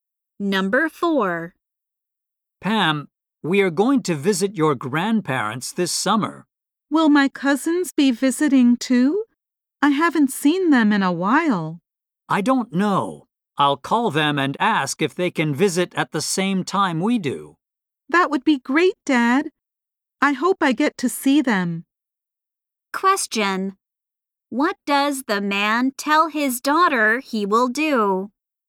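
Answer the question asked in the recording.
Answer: Call her cousins to ask if they can visit at the same time.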